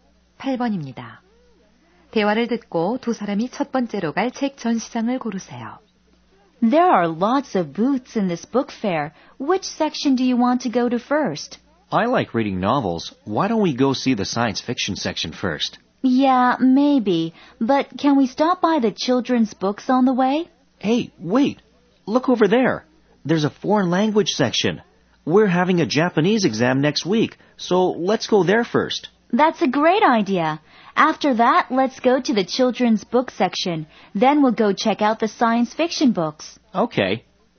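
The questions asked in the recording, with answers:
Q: 대화를 듣고 두 사람이 첫 번째로 갈 책 전시장을 고르세요.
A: 외국어 코너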